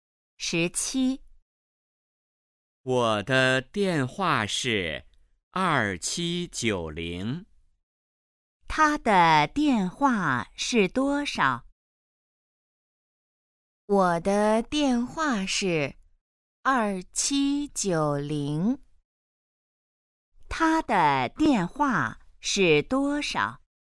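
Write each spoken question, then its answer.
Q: 他的电话是多少?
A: 2790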